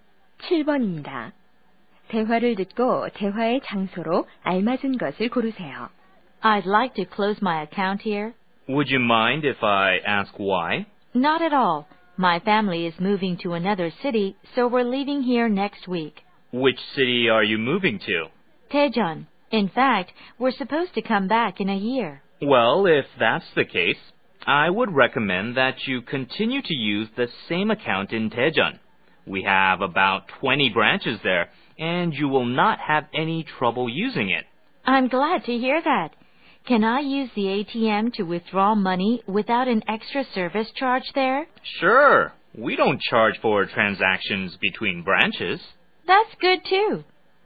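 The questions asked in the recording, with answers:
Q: 대화를 듣고 대화의 장소로 알맞은 것을 고르세요.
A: 은행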